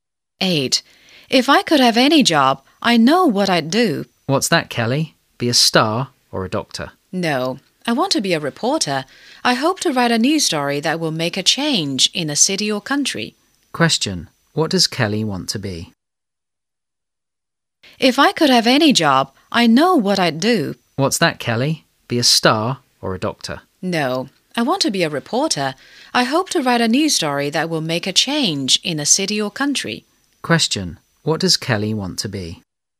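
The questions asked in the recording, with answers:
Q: What does Kelly want to be?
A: A reporter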